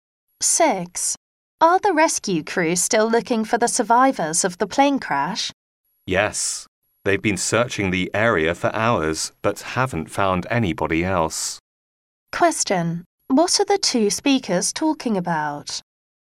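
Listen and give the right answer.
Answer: The search for survivors of a plane crash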